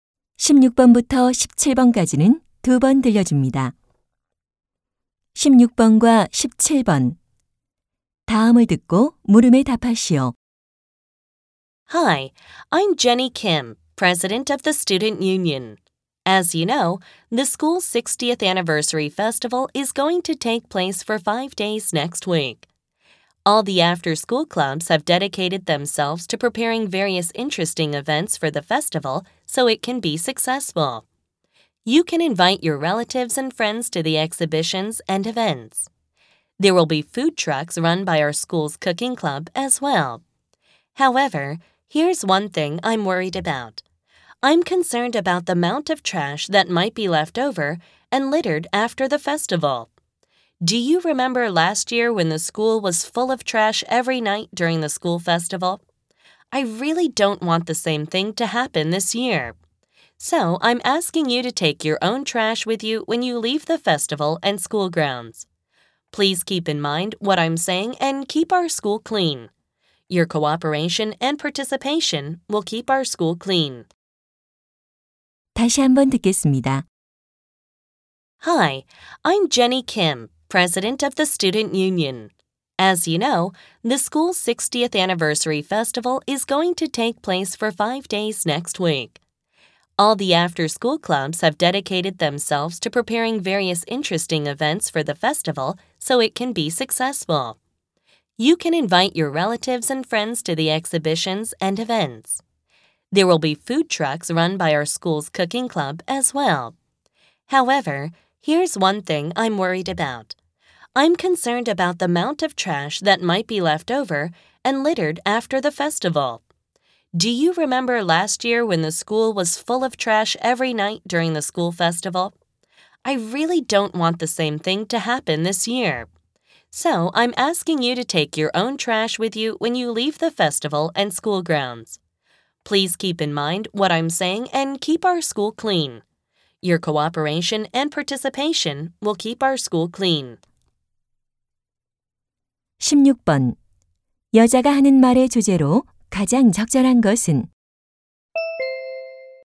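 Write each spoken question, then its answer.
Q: 여자가 하는 말의 주제로 가장 적절한 것은?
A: 축제 후 자기 쓰레기를 가져가 달라는 요청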